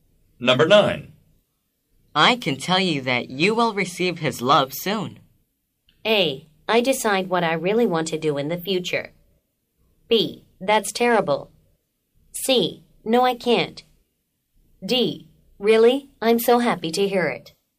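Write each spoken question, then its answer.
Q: I can tell you that you will receive his love soon.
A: D: Really? I'm so happy to hear it.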